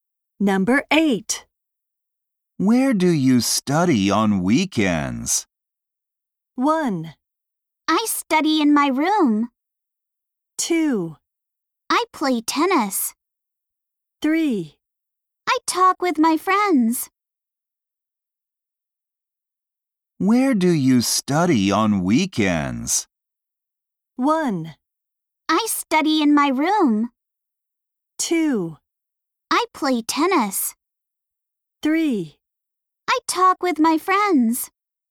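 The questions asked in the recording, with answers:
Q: Where do you study on weekends?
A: 1: I study in my room.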